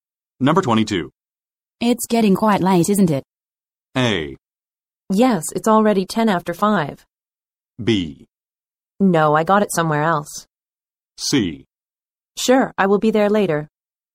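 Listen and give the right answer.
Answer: A: Yes, it's already 10 after 5.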